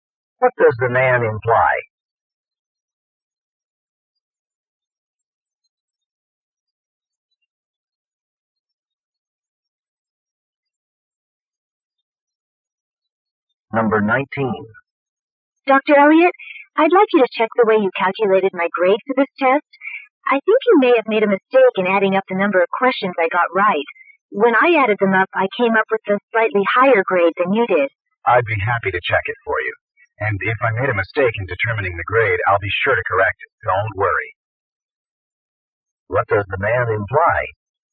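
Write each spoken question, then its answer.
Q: What does the man imply?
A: He will check the grade and correct it if he made a mistake.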